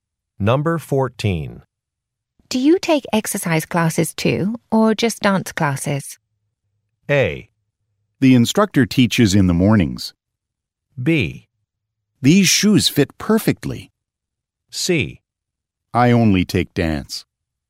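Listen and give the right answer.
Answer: C: I only take dance.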